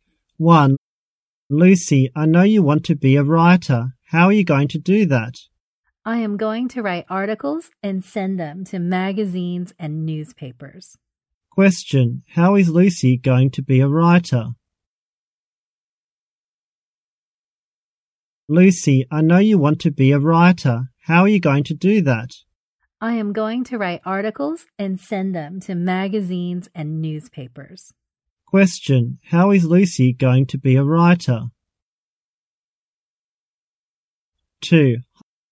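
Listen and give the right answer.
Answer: By writing articles and sending them to magazines and newspapers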